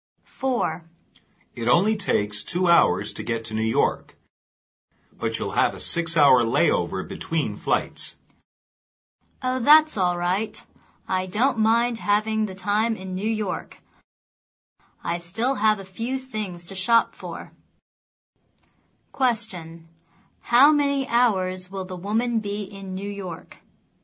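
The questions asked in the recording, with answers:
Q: How many hours will the woman be in New York?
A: 6 hours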